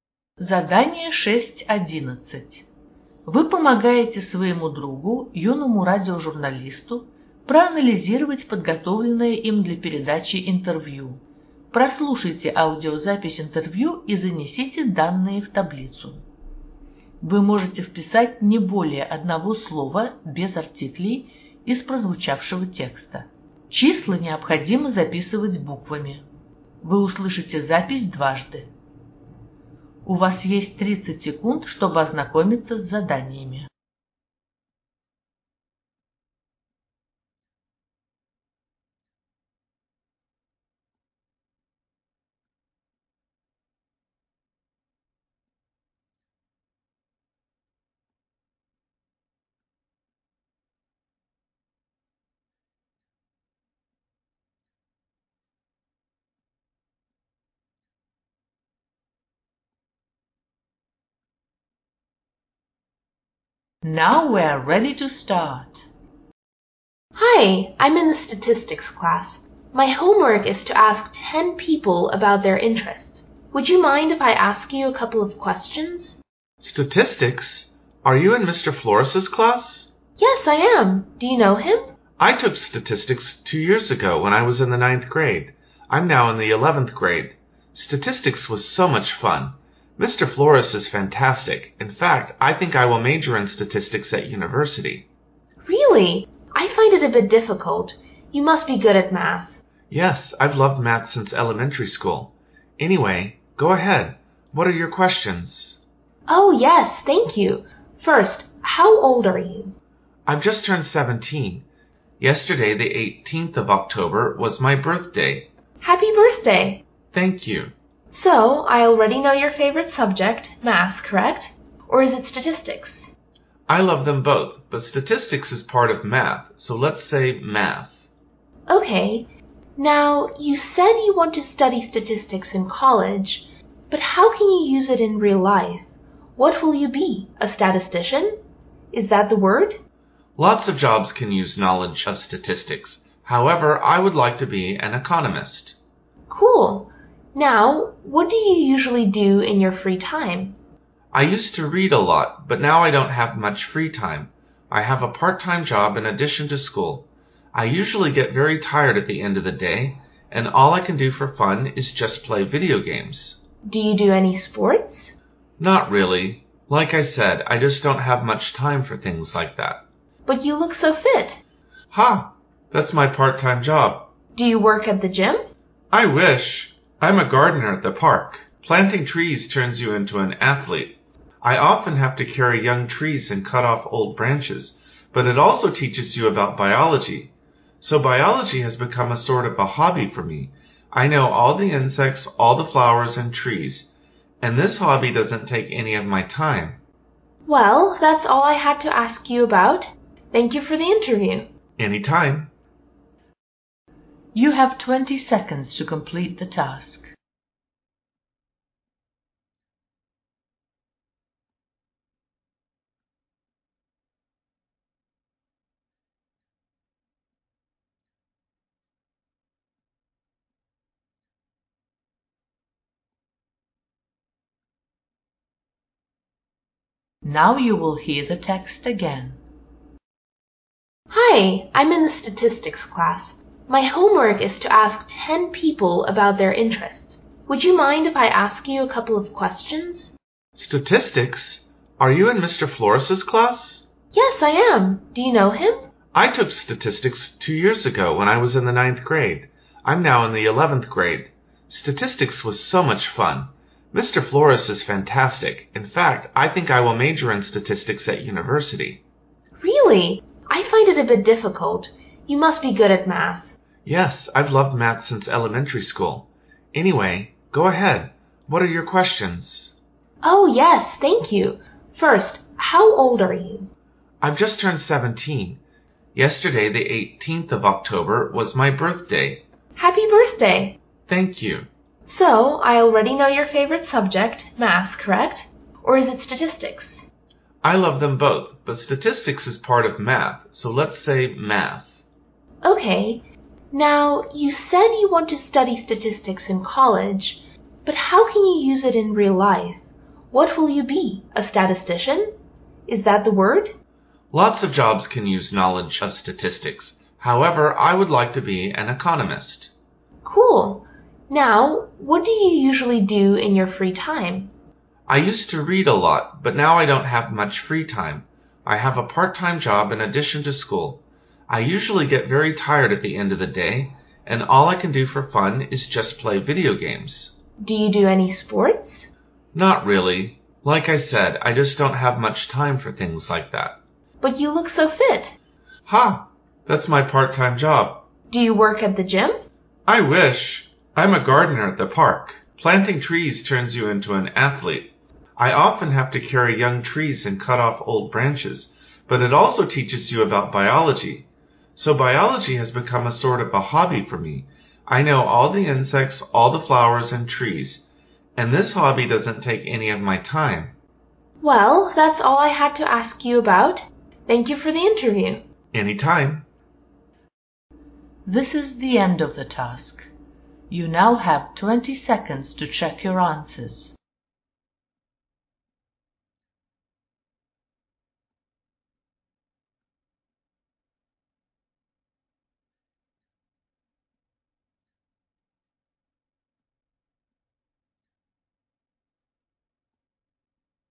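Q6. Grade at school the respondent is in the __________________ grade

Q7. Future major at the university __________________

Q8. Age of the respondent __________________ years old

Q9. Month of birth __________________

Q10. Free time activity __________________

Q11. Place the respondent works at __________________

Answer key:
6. eleventh
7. statistics
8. seventeen
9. October
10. video games
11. park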